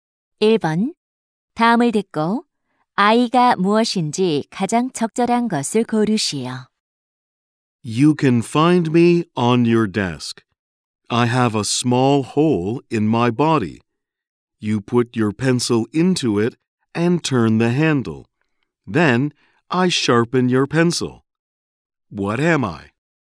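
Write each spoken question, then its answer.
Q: 다음을 듣고 아이가 무엇인지 가장 적절한 것을 고르시오.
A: 연필깎이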